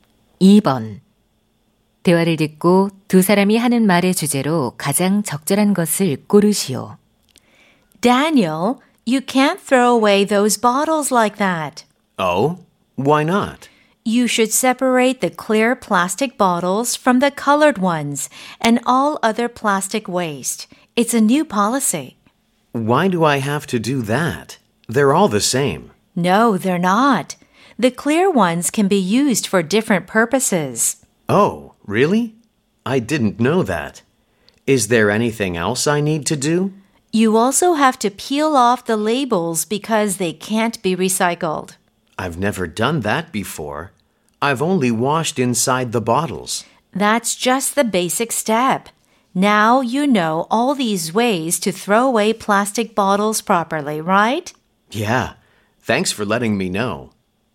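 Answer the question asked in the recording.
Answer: 플라스틱 병을 올바르게 분리배출하는 방법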